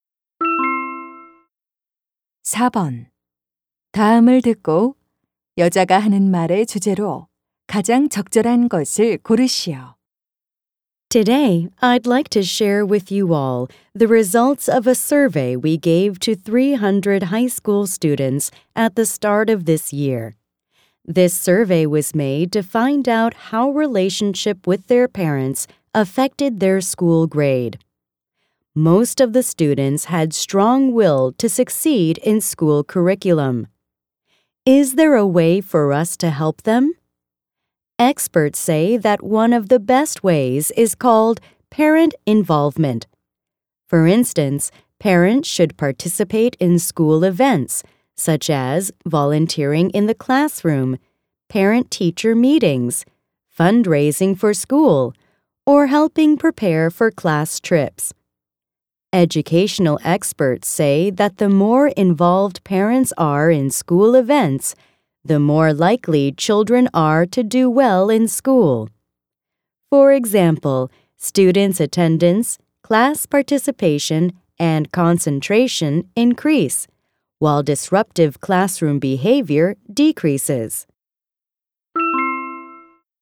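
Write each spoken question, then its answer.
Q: 다음을 듣고 여자가 하는 말의 주제로 가장 적절한 것을 고르시오.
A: 부모의 학교 행사 참여가 자녀의 학교생활과 성적에 주는 긍정적 영향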